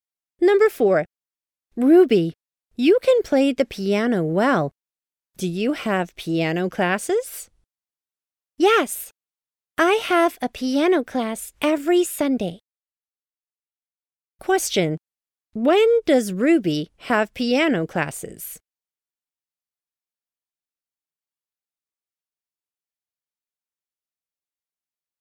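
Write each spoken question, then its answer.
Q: Question. When does Ruby have piano classes?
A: Every Sunday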